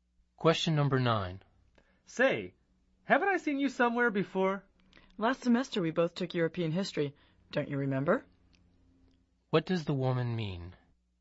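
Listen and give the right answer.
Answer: They took European history together last semester.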